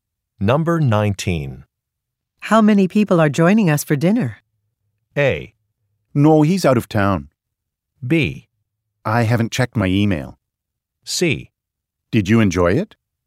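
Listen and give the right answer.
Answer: B: I haven't checked my email.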